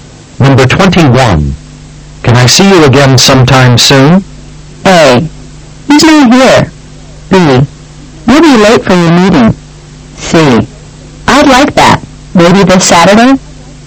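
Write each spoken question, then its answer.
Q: Can I see you again sometime soon?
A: C: I'd like that. Maybe this Saturday?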